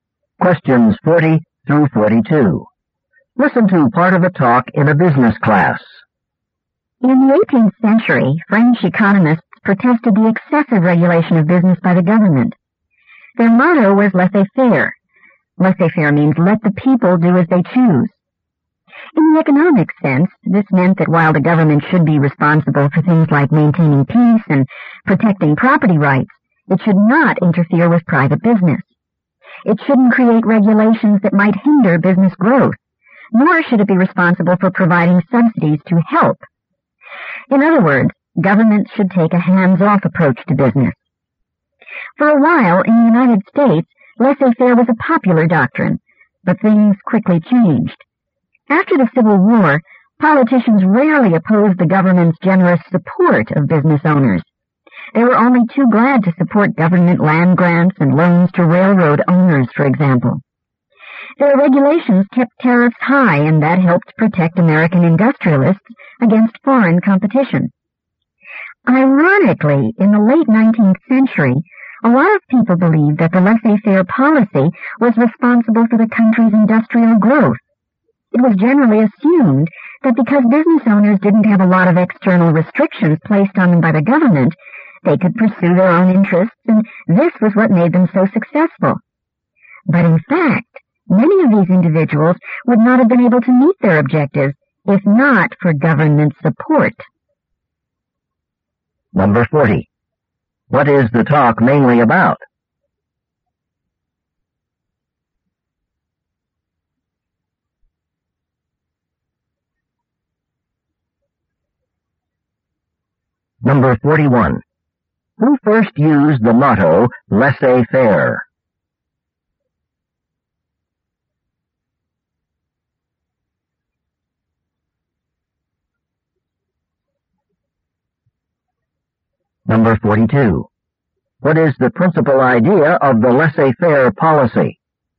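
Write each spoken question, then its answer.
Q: What is the talk mainly about?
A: The laissez-faire policy

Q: Who first used the motto, laissez-faire?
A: 18th-century French economists

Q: What is the principal idea of the laissez-faire policy?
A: The government should not interfere with private business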